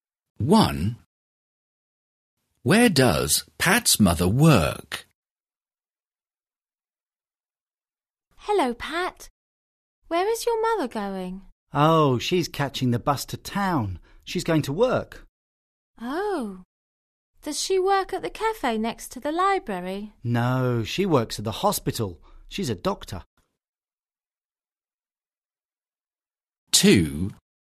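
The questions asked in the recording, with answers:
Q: Where does Pat's mother work?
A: At the hospital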